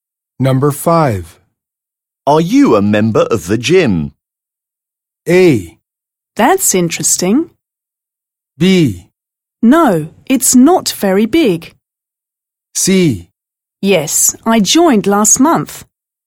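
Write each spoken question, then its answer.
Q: Are you a member of the gym?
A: C: Yes, I joined last month.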